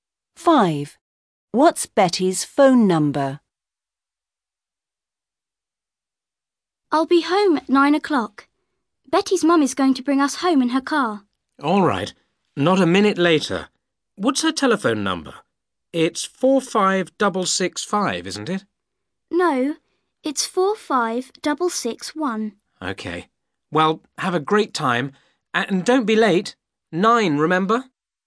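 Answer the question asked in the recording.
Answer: 45661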